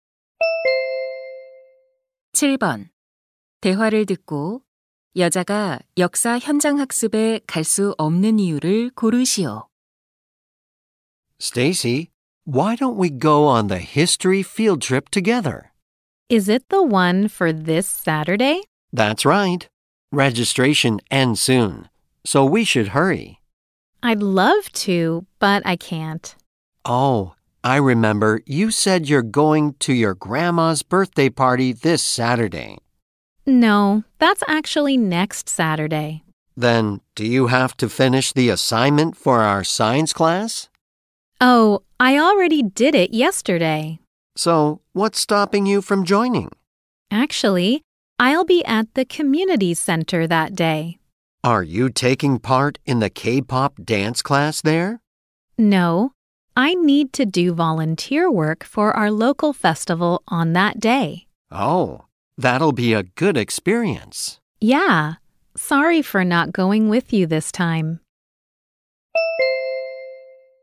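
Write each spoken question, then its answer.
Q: 대화를 듣고 여자가 역사 현장 학습에 갈 수 없는 이유를 고르시오.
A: 지역 축제 자원봉사를 해야 해서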